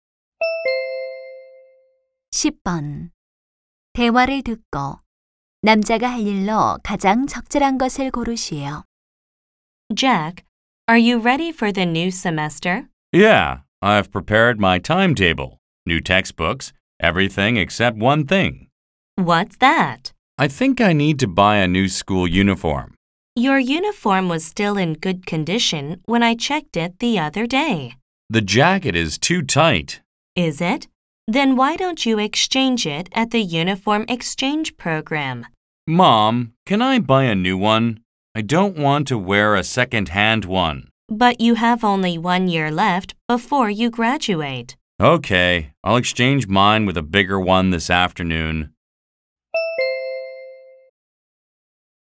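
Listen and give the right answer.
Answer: 교복 교환 프로그램에서 더 큰 교복으로 바꾸기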